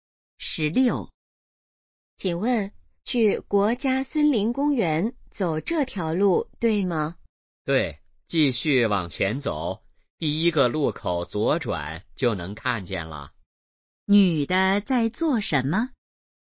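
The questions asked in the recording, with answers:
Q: 女的在做什么?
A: 问路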